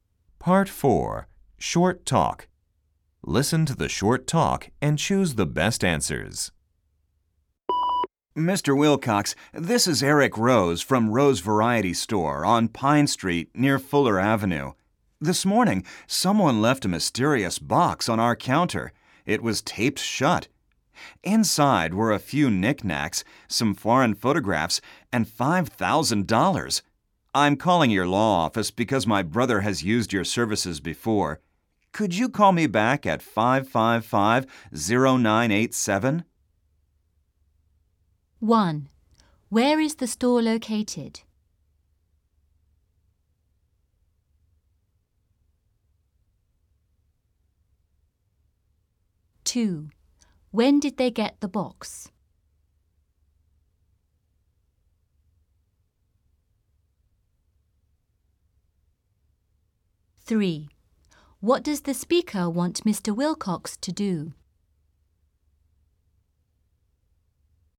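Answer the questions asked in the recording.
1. On Pine Street near Fuller Avenue
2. This morning
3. Call him back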